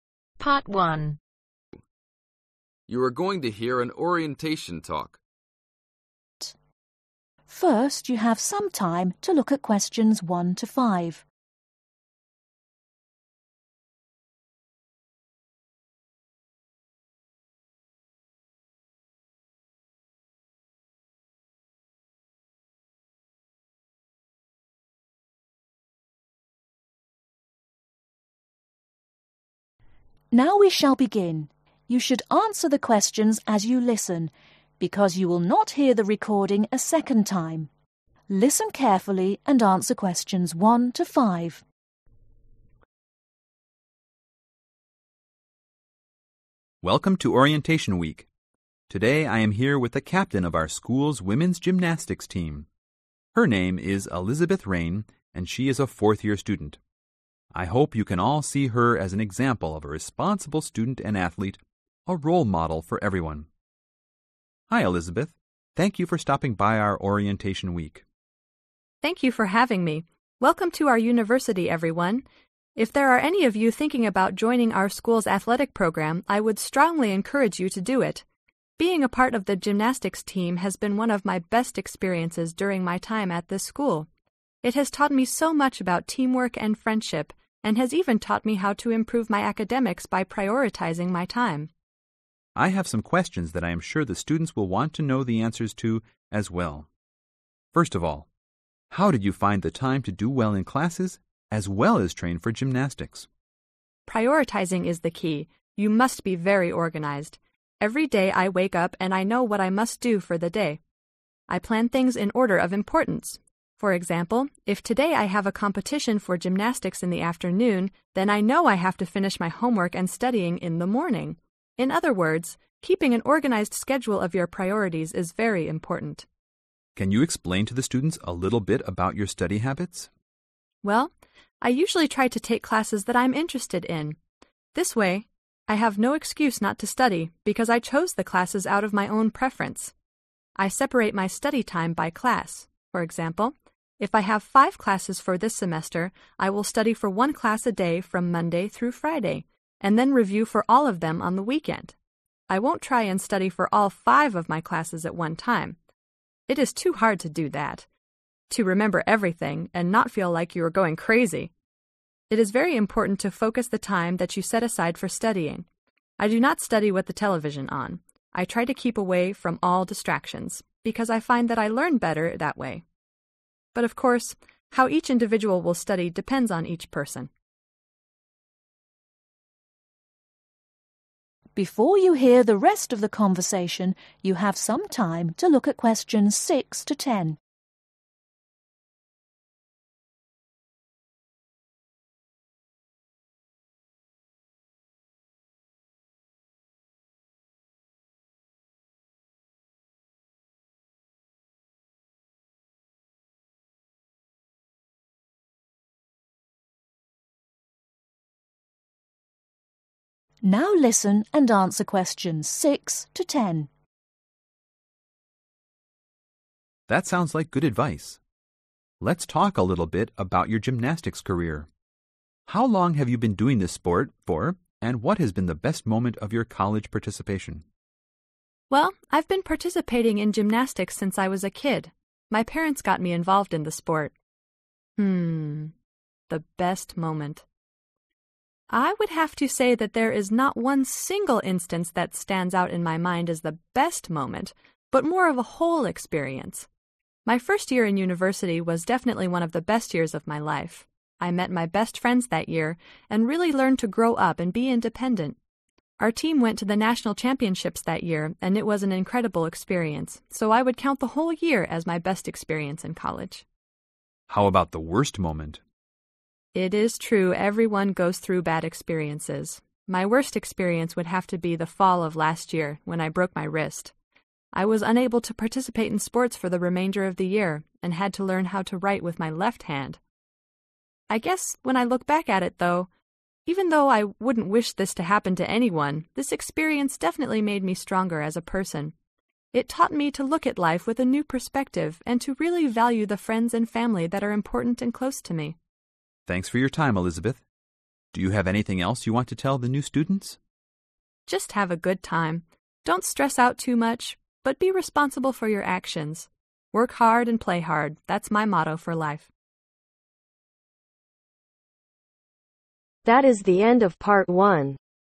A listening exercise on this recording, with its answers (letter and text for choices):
Circle the correct letter.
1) Why does Elizabeth encourage students to join the athletic program ?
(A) It helps her stay in shape.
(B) it has taught her about teamwork and friendship.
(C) it has been a fun painful experience.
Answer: (B) it has taught her about teamwork and friendship.

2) How does Elizabeth have time for both gymnastic and academics ?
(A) She is very efficient.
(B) she studies very organized.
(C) She is very organized.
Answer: (C) She is very organized.

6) Who help to start Elizabeth's participation in gymnastics ?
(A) herself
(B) her parents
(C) her sister.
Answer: (B) her parents

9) What was the effect of Elizabeth breaking her wrist ?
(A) She was unable to do her homework.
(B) She was unable to participate in sports.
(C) She was unable to write at all.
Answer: (B) She was unable to participate in sports.

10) Why does Elizabeth say that breaking her wrist made her stronger as a person ?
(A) She learned to value the people close to her.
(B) She learned to value the use of her hand.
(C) She learned to value her participation in sports.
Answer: (A) She learned to value the people close to her.